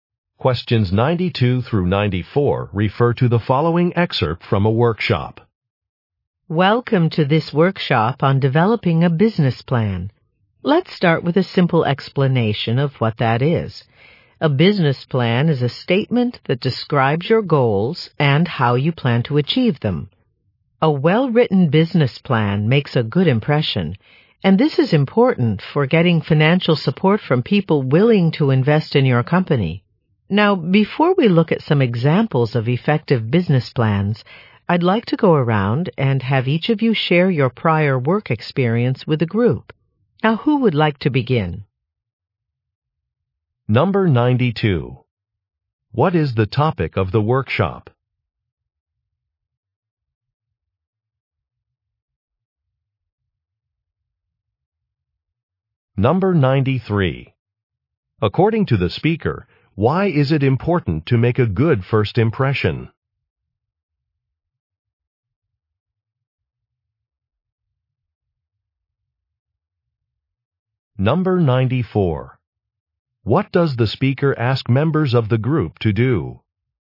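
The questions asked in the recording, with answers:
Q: What is the topic of the workshop?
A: Developing a business plan

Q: According to the speaker, why is it important to make a good first impression?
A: To get financial support from investors

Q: What does the speaker ask members of the group to do?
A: Share their prior work experience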